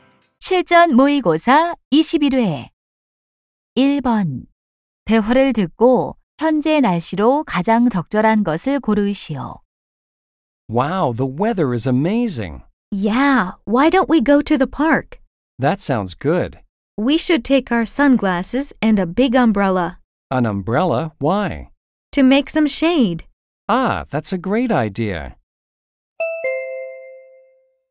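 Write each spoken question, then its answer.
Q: 대화를 듣고 현재 날씨로 가장 적절한 것을 고르시오.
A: 맑고 화창함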